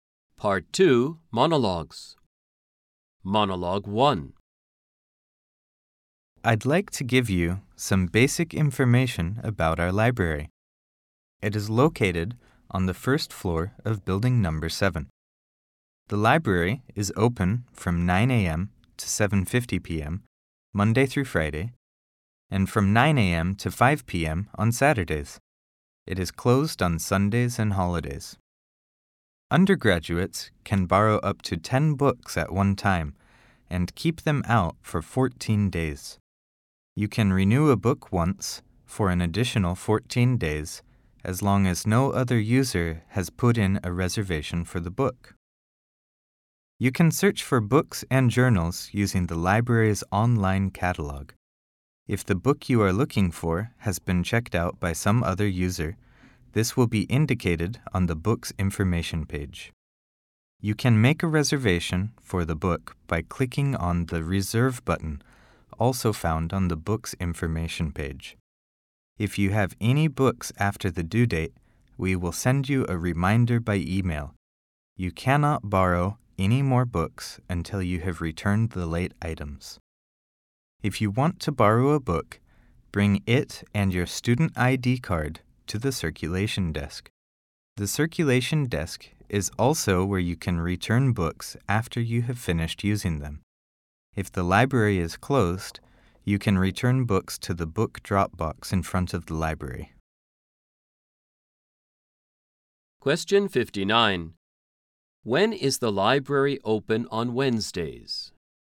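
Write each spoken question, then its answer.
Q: When is the library open on Wednesdays?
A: From 9 a.m. to 7:50 p.m.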